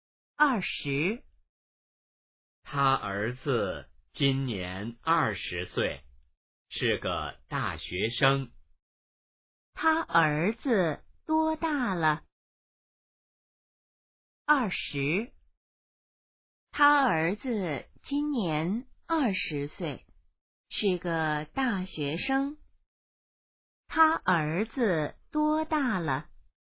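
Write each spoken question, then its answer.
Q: 他儿子多大了?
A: 20岁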